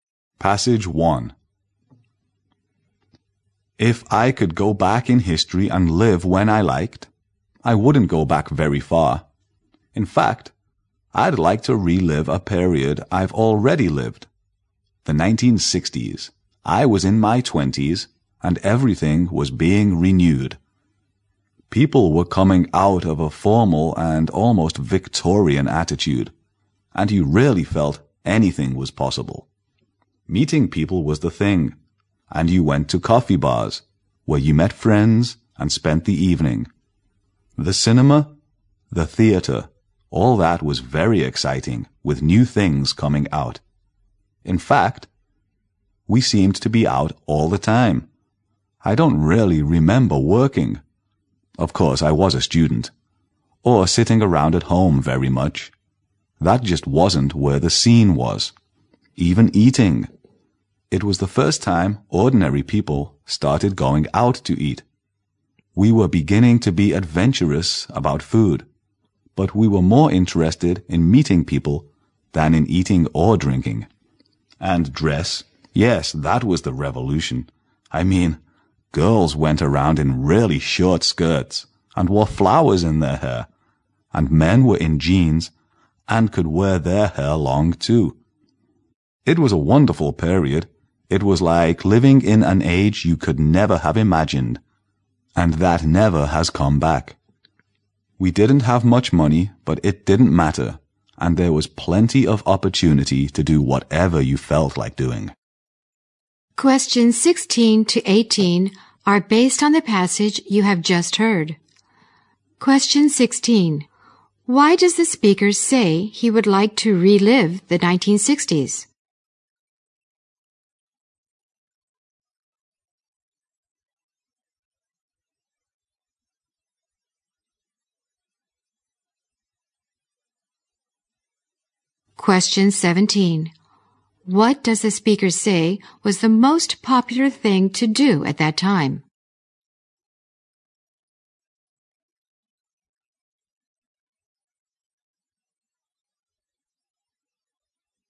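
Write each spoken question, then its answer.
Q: Why does the speaker say he would like to relive the 1960s?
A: Everything was being renewed and anything seemed possible

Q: What does the speaker say was the most popular thing to do at that time?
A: Meeting people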